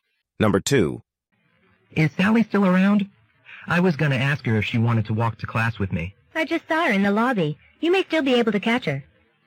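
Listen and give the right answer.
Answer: Sally is still nearby, so the man may catch her.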